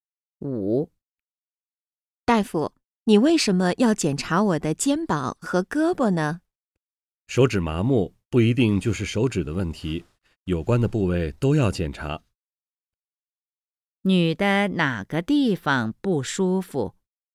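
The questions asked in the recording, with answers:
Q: 女的哪个地方不舒服?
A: 手指(麻木)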